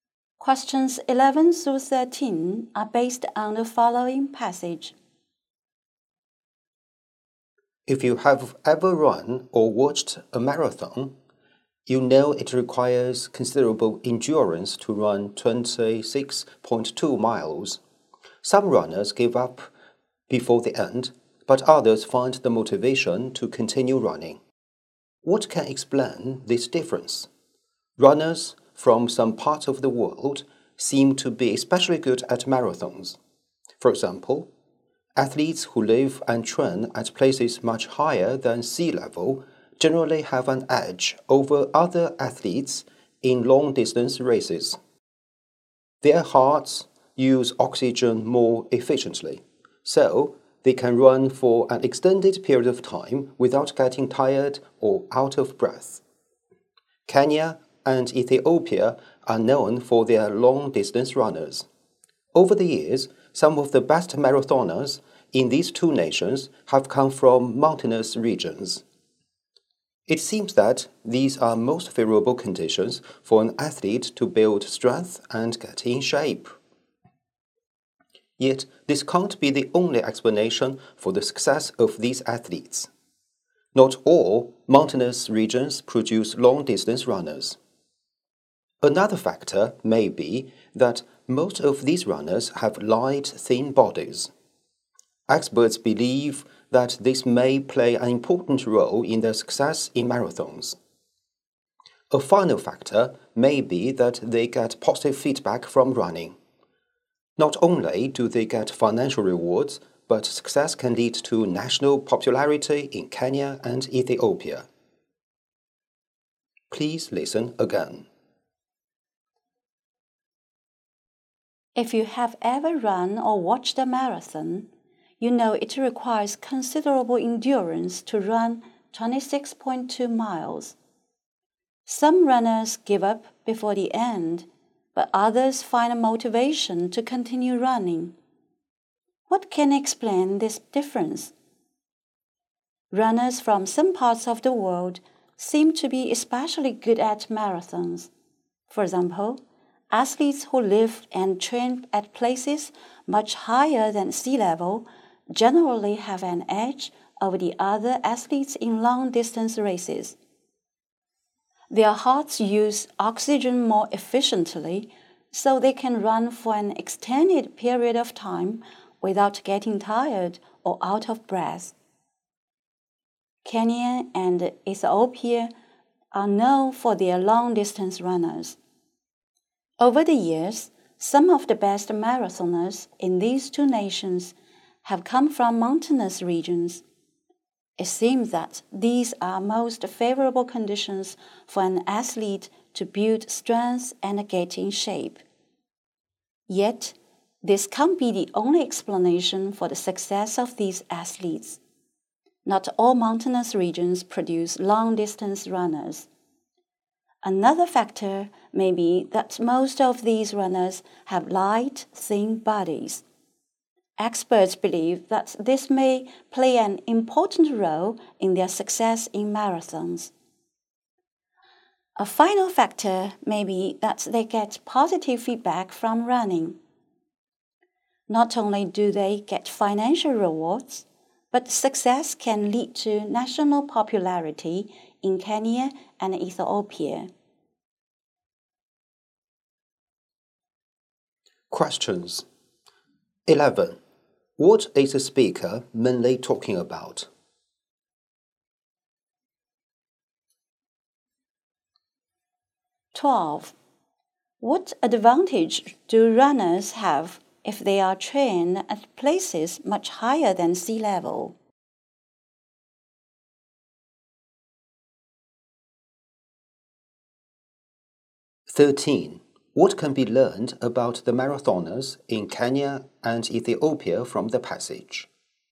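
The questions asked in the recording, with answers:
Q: What is the speaker mainly talking about?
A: Why some runners, like those from Kenya and Ethiopia, are good at marathons

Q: What advantage do runners have if they are trained at places much higher than sea level?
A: Their hearts use oxygen more efficiently, so they can run long without tiring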